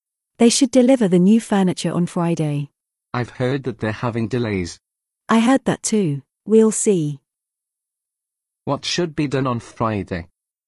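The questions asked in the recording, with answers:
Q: What should be done on Friday?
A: The new furniture should be delivered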